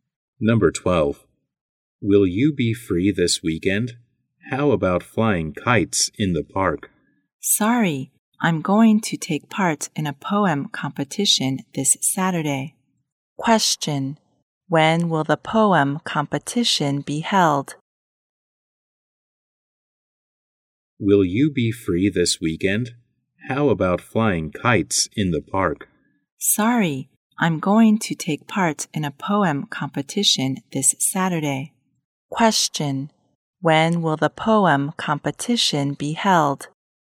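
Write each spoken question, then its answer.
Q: Question. When will the poem competition be held?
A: This Saturday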